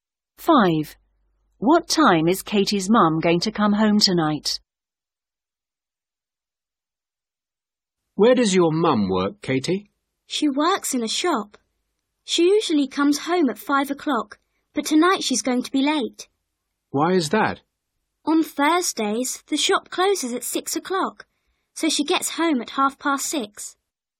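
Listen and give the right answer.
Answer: At 6:30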